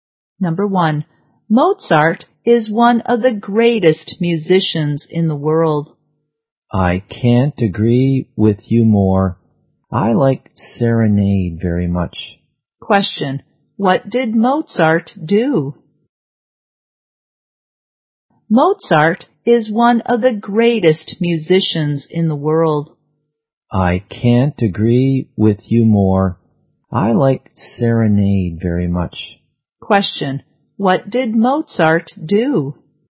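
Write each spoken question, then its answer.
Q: what did Mozart do?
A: He was a musician.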